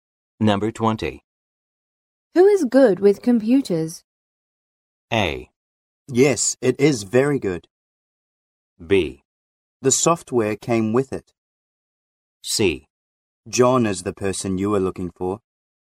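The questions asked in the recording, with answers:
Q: Who is good with computers?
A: C: John is the person you are looking for.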